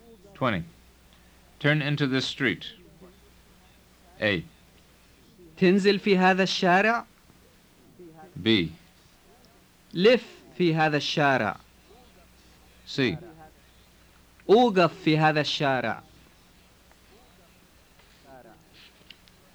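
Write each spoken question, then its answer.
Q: Turn into this street.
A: B: لف في هذا الشارع.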